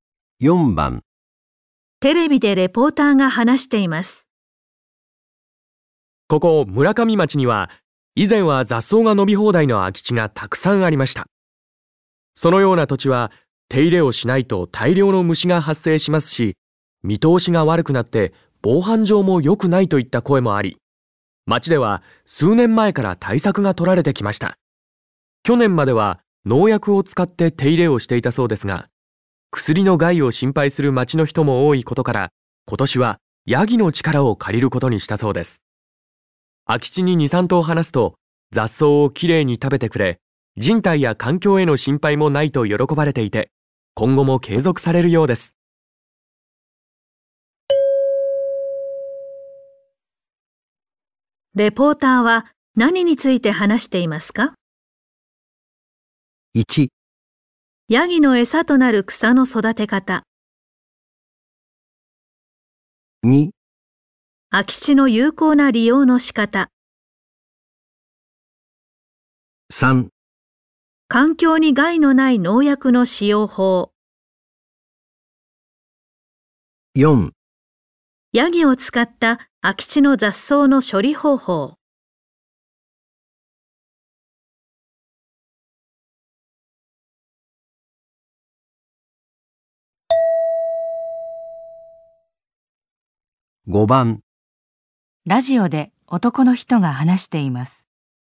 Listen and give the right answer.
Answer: 4

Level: N2 Listening · Test 3